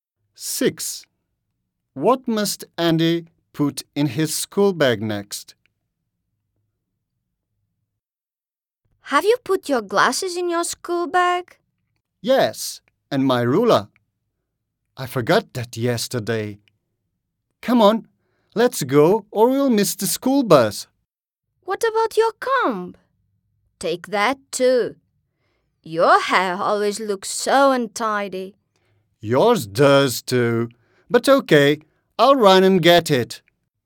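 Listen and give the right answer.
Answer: his comb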